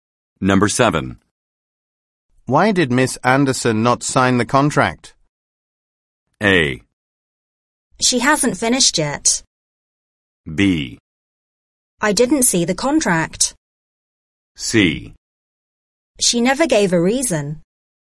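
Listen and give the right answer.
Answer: C: She never gave a reason.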